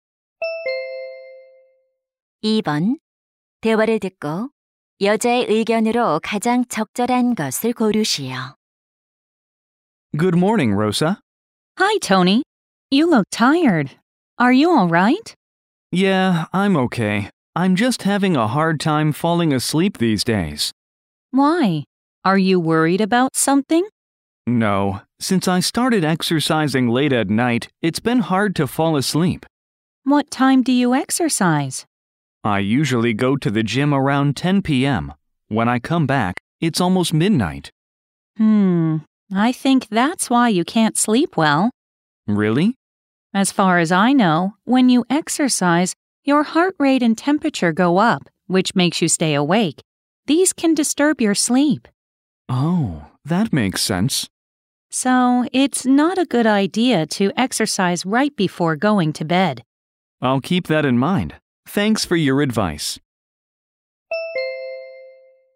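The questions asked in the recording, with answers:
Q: 대화를 듣고 여자의 의견으로 가장 적절한 것을 고르시오.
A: 잠자리에 들기 직전에 운동하는 것은 좋지 않다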